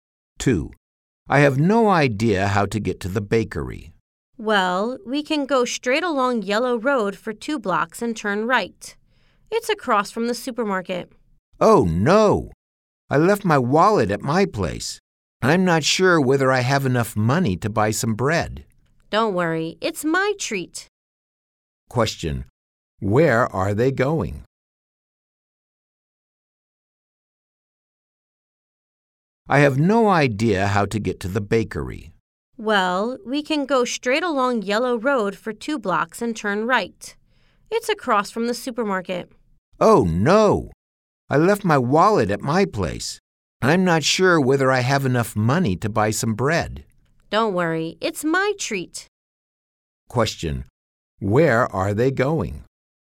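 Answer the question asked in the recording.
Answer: To the bakery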